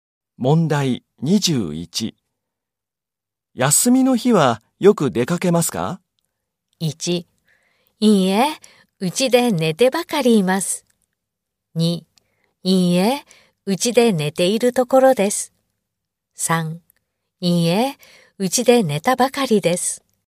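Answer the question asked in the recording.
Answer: 1: いいえ、うちで寝てばかりいます。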